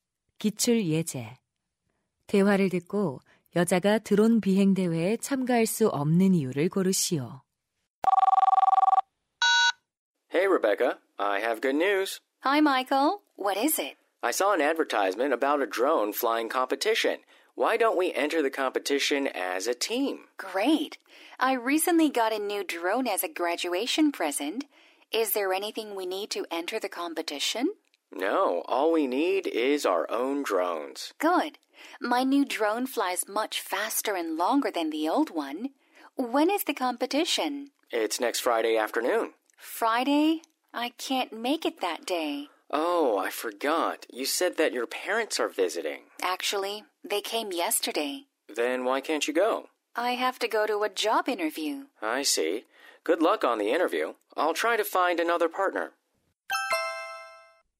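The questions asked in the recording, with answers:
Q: 대화를 듣고 여자가 드론 비행 대회에 참가할 수 없는 이유를 고르시오.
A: 취업 면접을 보러 가야 해서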